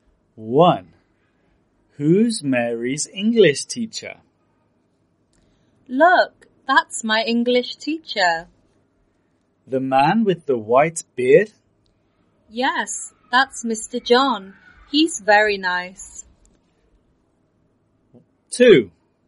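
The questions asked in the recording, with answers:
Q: Who's Mary's English teacher?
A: Mr. John, the man with the white beard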